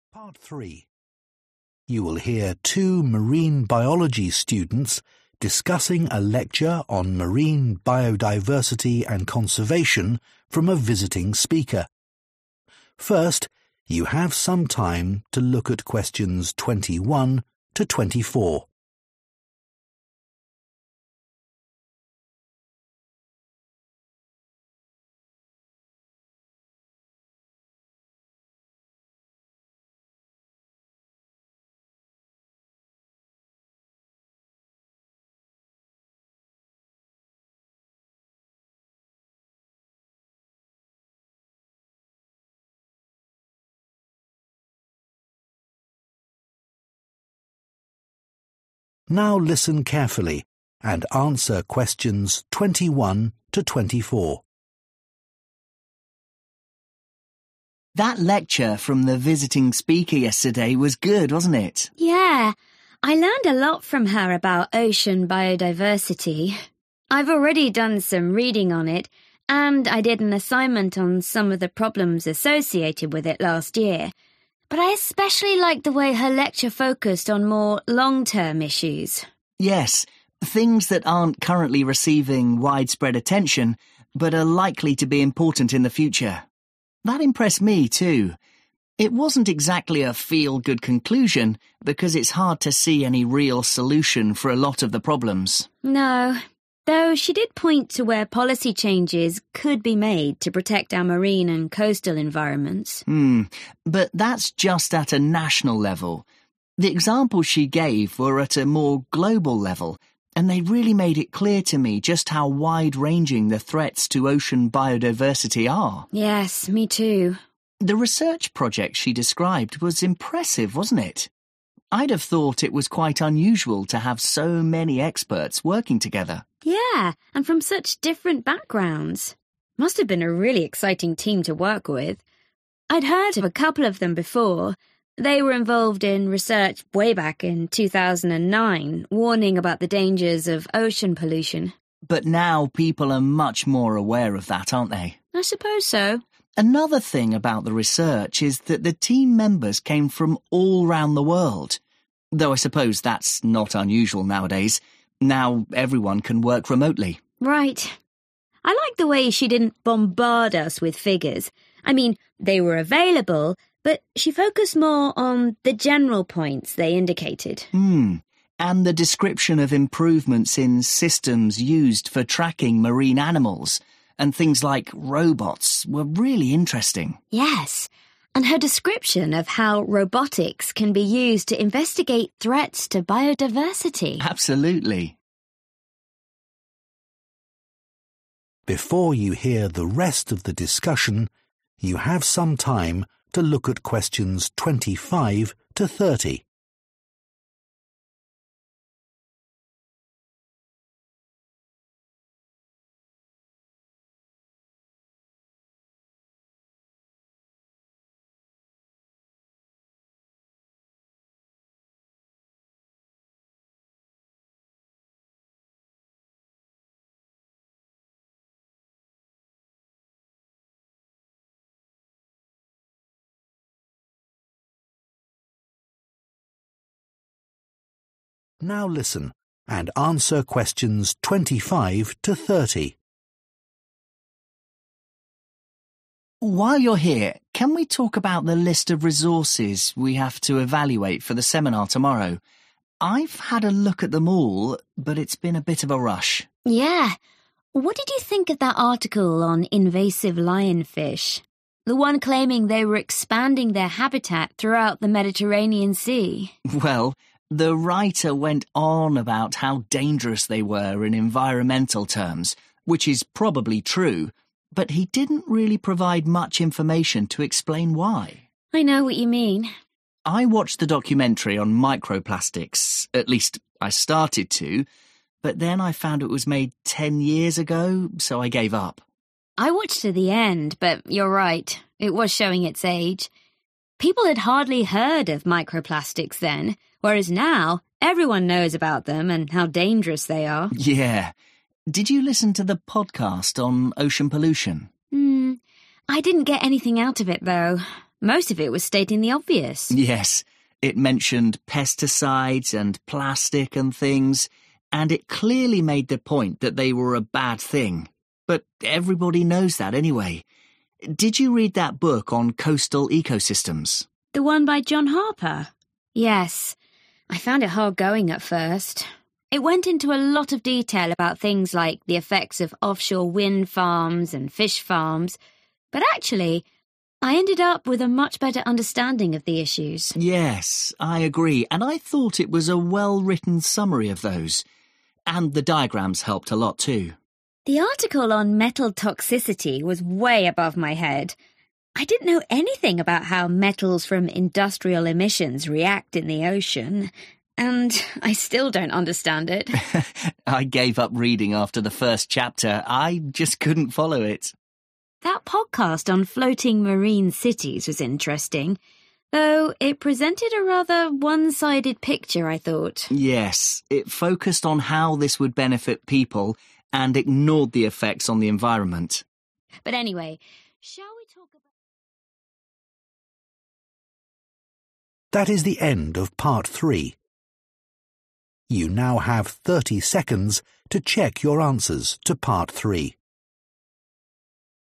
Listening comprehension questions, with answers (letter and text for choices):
Choose TWO letters, A–E.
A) This is aimed at a very specialist audience.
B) This is now rather outdated.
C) This was an effective description of a new danger.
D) This suggests possible ways to improve the situation.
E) This does not give a balanced account.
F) This is too predictable to be useful.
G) This gives insufficient evidence for its claims.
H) This gives a clear explanation of the problems.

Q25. Article on invasive lionfish __________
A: G) This gives insufficient evidence for its claims.

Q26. Documentary on microplastics __________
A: B) This is now rather outdated.

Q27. Podcast on ocean pollution __________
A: F) This is too predictable to be useful.

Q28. Book on coastal ecosystems __________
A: H) This gives a clear explanation of the problems.

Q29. Article on metal toxicity __________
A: A) This is aimed at a very specialist audience.

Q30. Podcast on floating marine cities __________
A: E) This does not give a balanced account.

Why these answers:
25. Bài báo nói nhiều về sự nguy hiểm của lionfish nhưng không cung cấp đủ thông tin giải thích vì sao.
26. Bộ phim tài liệu được làm từ 10 năm trước nên đã lỗi thời.
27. Podcast chỉ nói những điều ai cũng biết nên không hữu ích.
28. Cuốn sách giúp họ hiểu rõ hơn về các vấn đề và có sơ đồ minh họa tốt.
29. Bài viết về độc tính kim loại quá chuyên sâu, khiến cả hai đều không hiểu.
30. Podcast về thành phố nổi trên biển chỉ nói lợi ích cho con người mà bỏ qua tác động môi trường.

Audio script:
PHIL: That lecture from the visiting speaker yesterday was good, wasn't it?
LUCY: Yeah. I learned a lot from her about ocean biodiversity. I've already done some reading on it, and I did an assignment on some of the problems associated with it last year. But I especially liked the way her lecture focused on more long-term issues.
PHIL: Yes, things that aren't currently receiving widespread attention but are likely to be important in the future. That impressed me too. It wasn't exactly a feel-good conclusion, because it's hard to see any real solution for a lot of the problems.
LUCY: No, though she did point to where policy changes could be made to protect our marine and coastal environments.
PHIL: But that's just at a national level. The examples she gave were at a more global level, and they really made it clear to me just how wide-ranging the threats to ocean biodiversity are.
LUCY: Yes, me too.
PHIL: The research project she described was impressive, wasn't it? I'd have thought it was quite unusual to have so many experts working together.
LUCY: Yeah, and from such different backgrounds. Must have been a really exciting team to work with. I'd heard of a couple of them before. They were involved in research way back in 2009, warning about the dangers of ocean pollution.
PHIL: But now people are much more aware of that, aren't they?
LUCY: I suppose so.
PHIL: Another thing about the research is that the team members came from all around the world, though I suppose that's not unusual nowadays. Now everyone can work remotely.
LUCY: Right. I like the way she didn't bombard us with figures. I mean, they were available, but she focused more on the general points they indicated.
PHIL: And the description of improvements in systems used for tracking marine animals and things like robots were really interesting.
LUCY: Yes, and her description of how robotics can be used to investigate threats to biodiversity.
PHIL: Absolutely. While you're here, can we talk about the list of resources we have to evaluate for the seminar tomorrow? I've had a look at them all, but it's been a bit of a rush.
LUCY: Yeah. What did you think of that article on invasive lionfish? The one claiming they were expanding their habitat throughout the Mediterranean Sea.
PHIL: Well, the writer went on about how dangerous they were in environmental terms, which is probably true, but he didn't really provide much information to explain why.
LUCY: I know what you mean.
PHIL: I watched the documentary on microplastics, at least I started to, but then I found it was made ten years ago, so I gave up.
LUCY: I watched to the end, but you're right, it was showing its age. People had hardly heard of microplastics then, whereas now everyone knows about them and how dangerous they are.
PHIL: Yeah. Did you listen to the podcast on ocean pollution?
I didn't get anything out of it though. Most of it was stating the obvious.
PHIL: Yes. It mentioned pesticides and plastic and things, and it clearly made the point that they were a bad thing. But everybody knows that anyway. Did you read that book on coastal ecosystems?
LUCY: The one by John Harper? Yes. I found it hard going at first. It went into a lot of detail about things like the effects of offshore wind farms and fish farms. But actually, I ended up with a much better understanding of the issues.
PHIL: Yes, I agree, and I thought it was a well-written summary of those. And the diagrams helped a lot too.
LUCY: The article on metal toxicity was way above my head. I didn't know anything about how metals from industrial emissions react in the ocean, and I still don't understand it.
PHIL: I gave up reading after the first chapter. I just couldn't follow it.
LUCY: That podcast on floating marine cities was interesting, though it presented a rather one-sided picture, I thought.
PHIL: Yes. It focused on how this would benefit people and ignored the effects on the environment.
LUCY: But anyway, shall we...